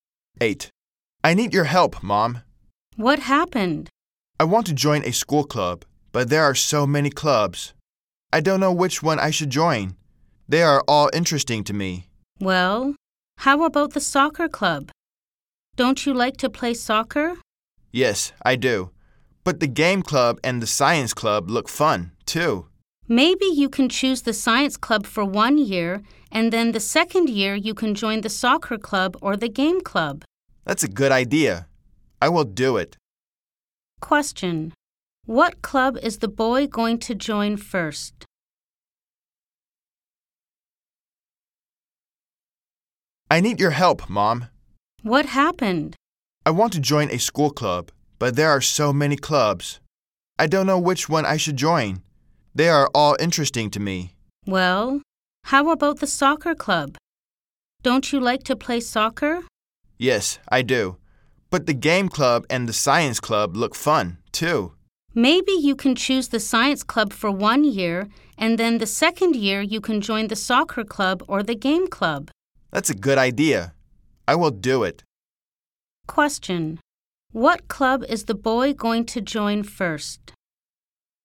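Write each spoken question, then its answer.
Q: What club is the boy going to join first?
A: The science club.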